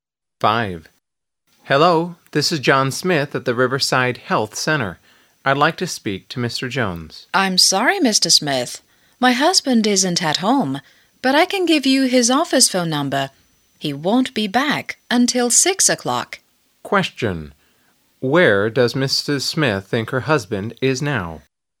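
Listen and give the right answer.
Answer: In his office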